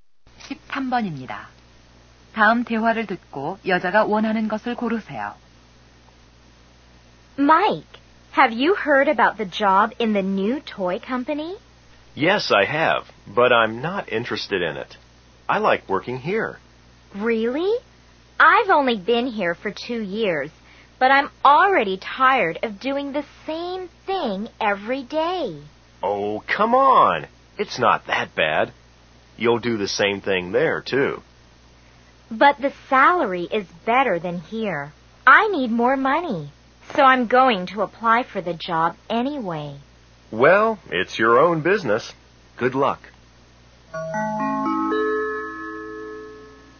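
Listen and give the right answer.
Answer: 월급이 더 많은 새 직장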